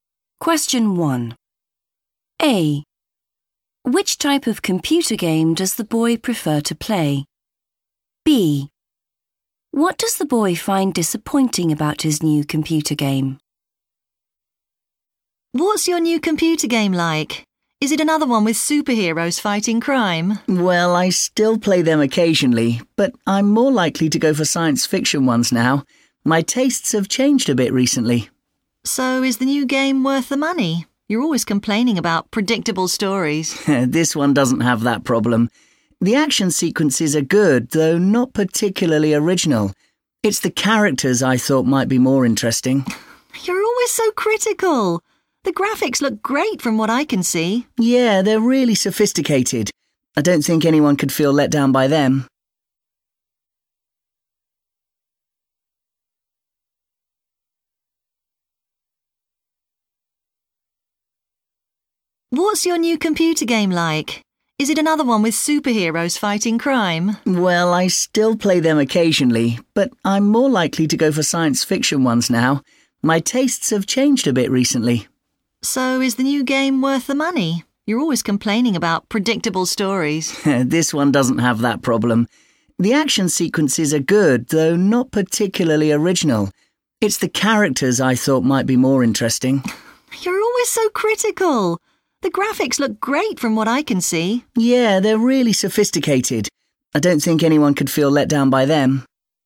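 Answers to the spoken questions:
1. science fiction games
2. the characters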